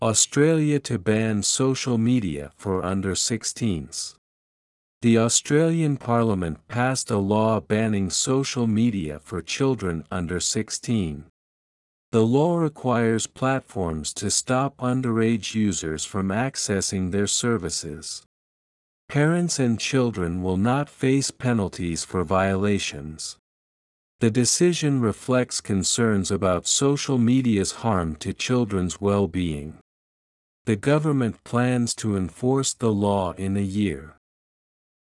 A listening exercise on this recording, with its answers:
次の各質問の答えを探しながら聞きましょう。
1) Who passed the bill banning social media for children under 16?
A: The Australian Parliament did.

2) What does the law require platforms to do?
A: To block access for underage users.

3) Why did the Australian Parliament pass the law?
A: To protect children from social media's negative effects.

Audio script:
Australia to ban social media for under 16s
The Australian Parliament passed a law banning social media for children under 16.
The law requires platforms to stop underage users from accessing their services.
Parents and children will not face penalties for violations.
The decision reflects concerns about social media's harm to children's well-being.
The government plans to enforce the law in a year.